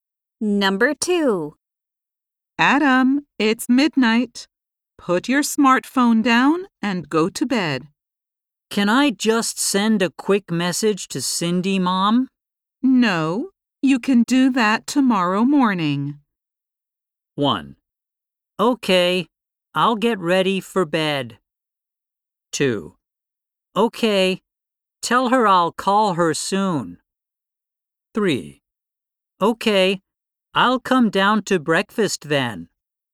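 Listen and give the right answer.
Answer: 1: Okay, I'll get ready for bed.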